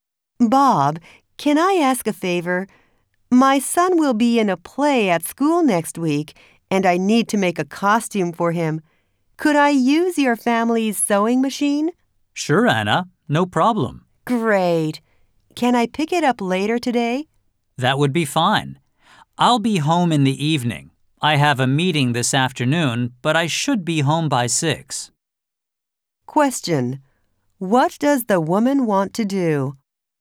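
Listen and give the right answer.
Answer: Borrow Bob's family's sewing machine to make her son's costume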